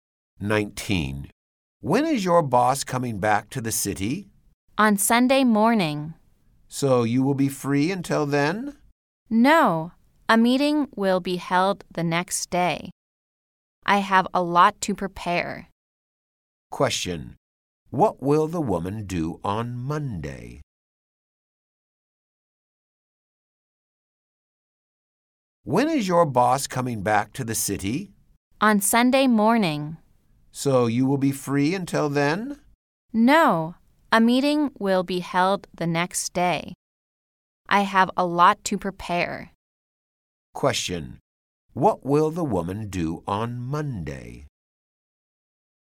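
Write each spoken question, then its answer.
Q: Question. What will the woman do on Monday?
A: Attend a meeting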